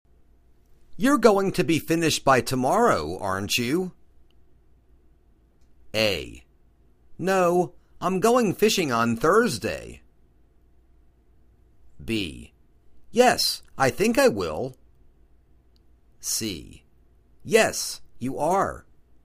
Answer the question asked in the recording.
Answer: Yes, I think I will.